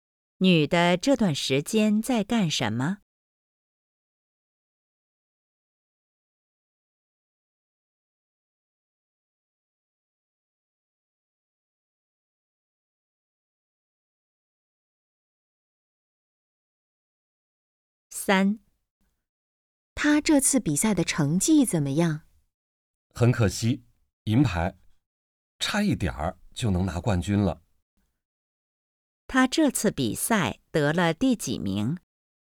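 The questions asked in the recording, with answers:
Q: 他这次比赛得了第几名?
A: 第二名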